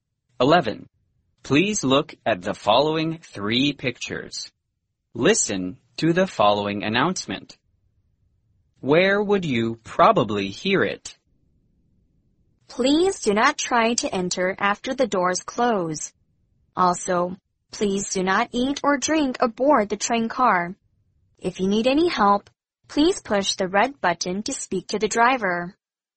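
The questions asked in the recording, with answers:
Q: Where would you probably hear it?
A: On a train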